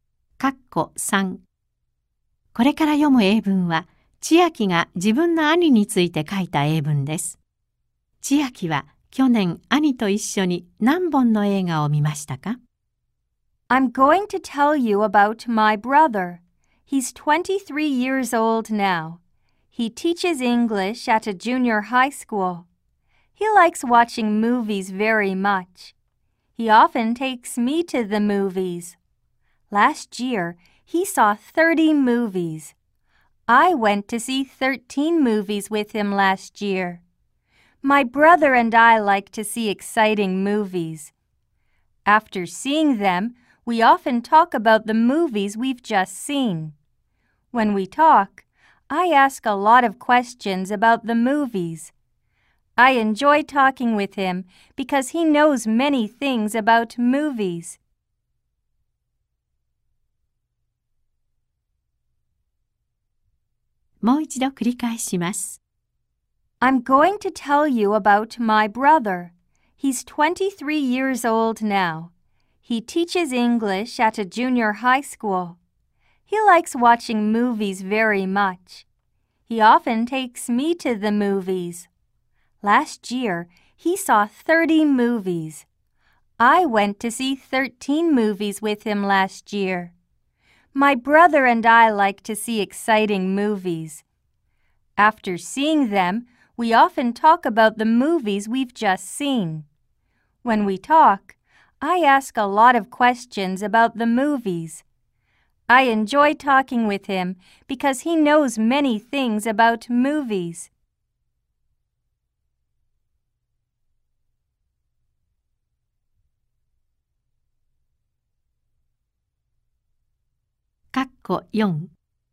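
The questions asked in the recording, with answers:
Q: 千秋は去年兄と一緒に何本の映画を見ましたか?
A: 13本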